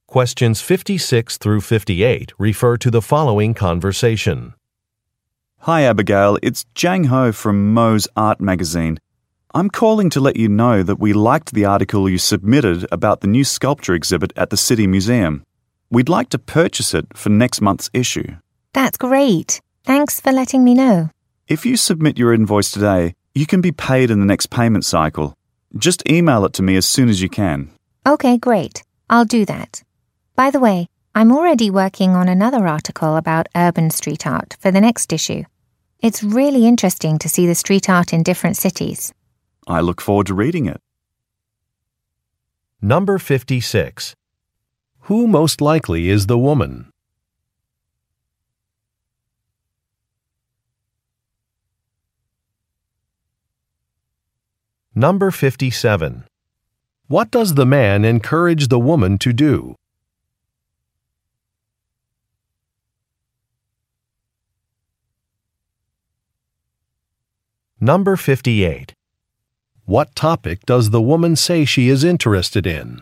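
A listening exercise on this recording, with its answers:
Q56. Who most likely is the woman?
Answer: A writer

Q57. What does the man encourage the woman to do?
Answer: Submit an invoice

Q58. What topic does the woman say she is interested in?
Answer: Street artwork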